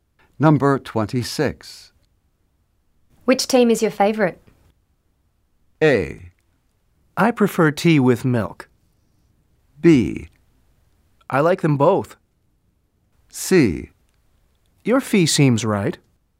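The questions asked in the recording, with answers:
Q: Which team is your favorite?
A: B: I like them both.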